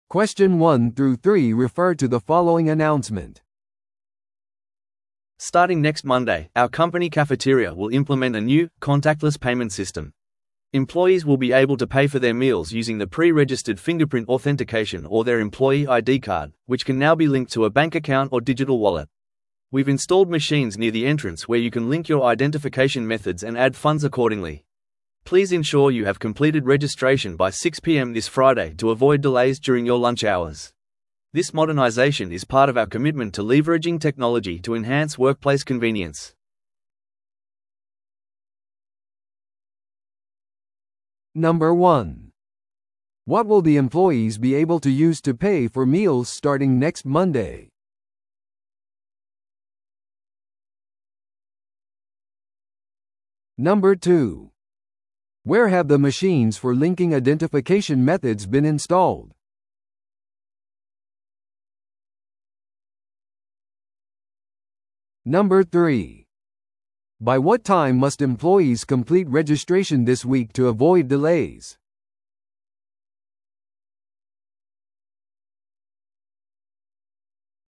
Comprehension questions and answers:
Listen to the audio below and answer the questions.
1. What will the employees be able to use to pay for meals starting next Monday?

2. Where have the machines for linking identification methods been installed?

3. By what time must employees complete registration this week to avoid delays?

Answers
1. B: Fingerprint authentication or employee ID card
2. B: Near the cafeteria entrance
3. C: By 6pm on Friday

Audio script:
Starting next Monday, our company cafeteria will implement a new, contactless payment system. Employees will be able to pay for their meals using the pre-registered fingerprint authentication or their employee ID card, which can now be linked to a bank account or digital wallet. We've installed machines near the entrance where you can link your identification methods and add funds accordingly. Please ensure you have completed registration by 6pm this Friday to avoid delays during your lunch hours. This modernization is part of our commitment to leveraging technology to enhance workplace convenience.